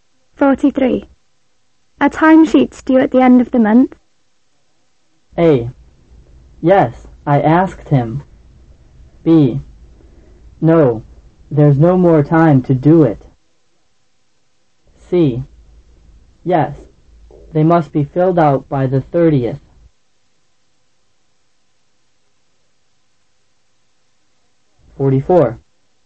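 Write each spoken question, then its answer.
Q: Are timesheets due at the end of the month?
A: C: Yes, they must be filled out by the 30th.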